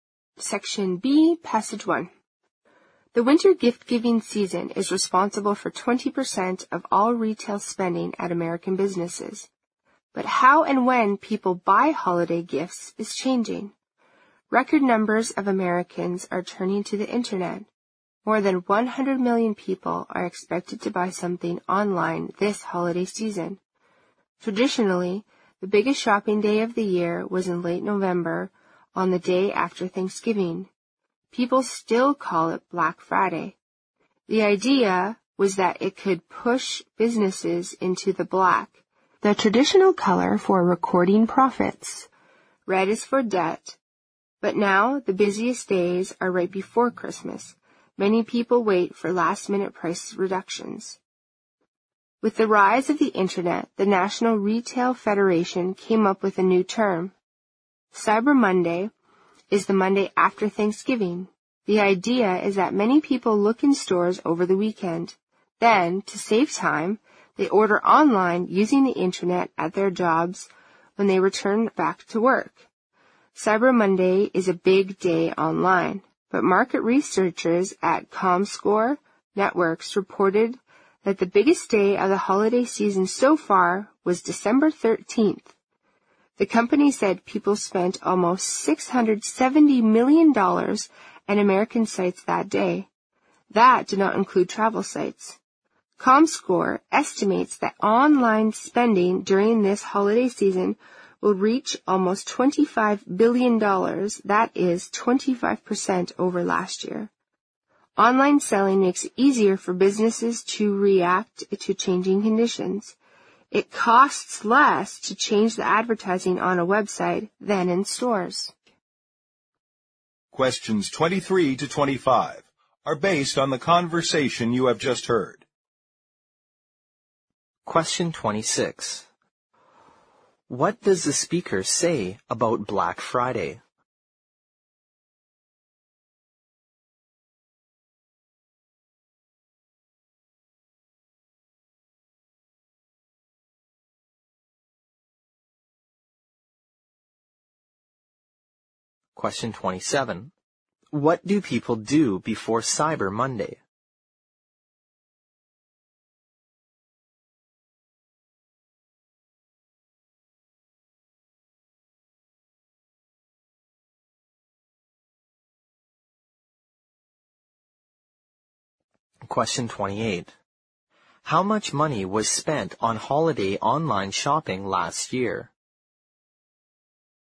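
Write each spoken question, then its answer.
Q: What does the speaker say about Black Friday?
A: It used to be the biggest shopping day of the year, the day after Thanksgiving.

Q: What do people do before Cyber Monday?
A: They look in stores over the weekend.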